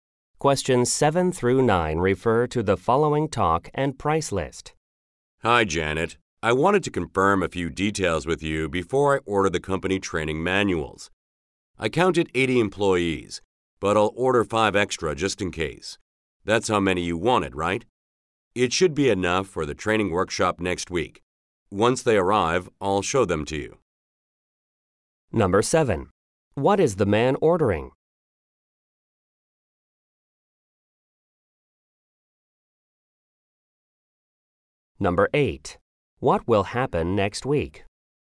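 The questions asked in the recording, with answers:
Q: What is the man ordering?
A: Company training manuals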